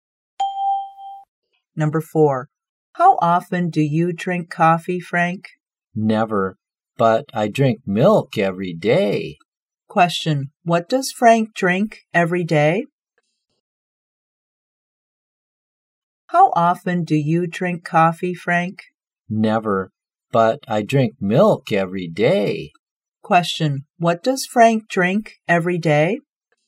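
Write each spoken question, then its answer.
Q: Question, what does Frank drink every day?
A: Milk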